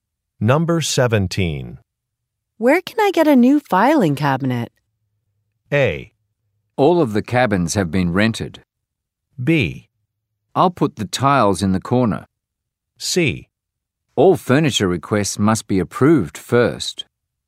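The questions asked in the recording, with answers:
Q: Where can I get a new filing cabinet?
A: C: All furniture requests must be approved first.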